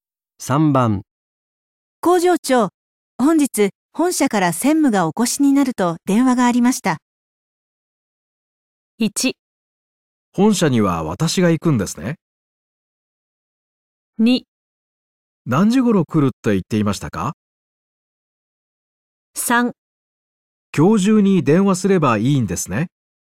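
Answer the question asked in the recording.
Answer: 2: 何時頃来るって言っていましたか?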